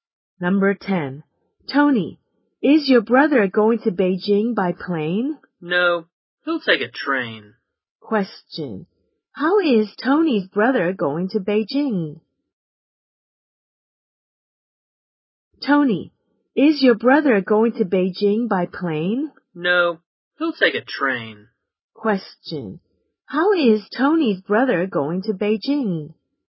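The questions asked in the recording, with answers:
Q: How is Tony's brother going to Beijing?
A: By train.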